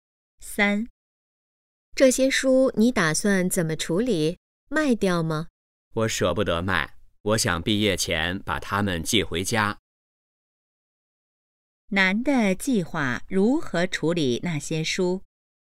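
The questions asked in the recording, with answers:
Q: 男的计划如何处理那些书?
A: 毕业前寄回家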